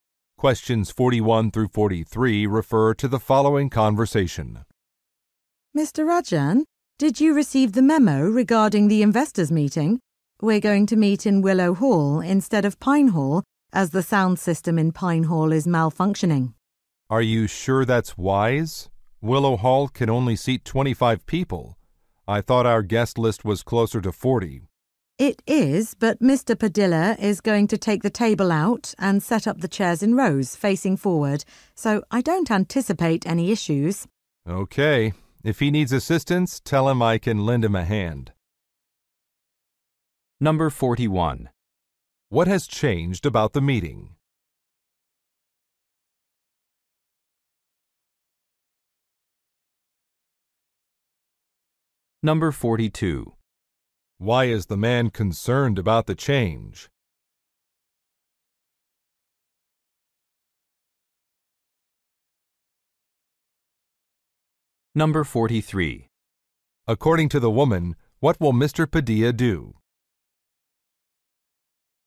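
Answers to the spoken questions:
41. It has moved to Willow Hall
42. The room may be too small for the guests
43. Take the table out and set up the chairs in rows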